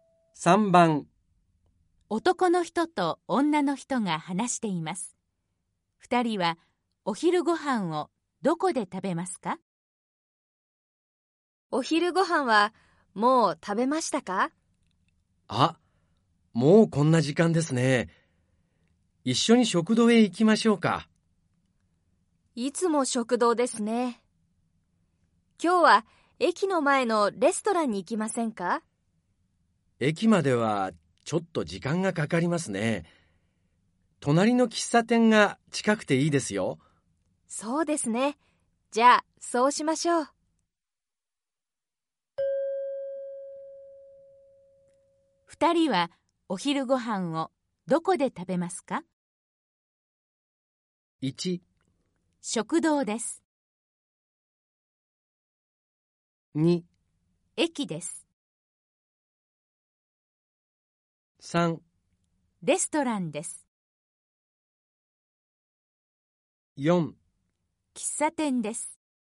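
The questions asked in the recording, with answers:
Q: 二人はお昼ご飯をどこで食べますか?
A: 4: 喫茶店です。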